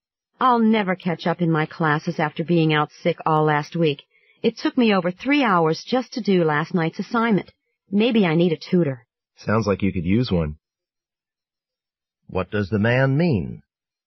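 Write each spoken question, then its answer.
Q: What does the man mean?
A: He agrees the woman should get a tutor.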